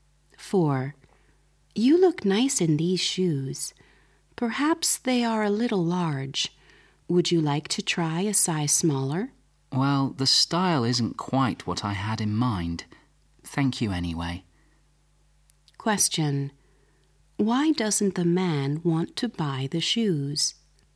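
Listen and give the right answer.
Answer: He doesn't like the style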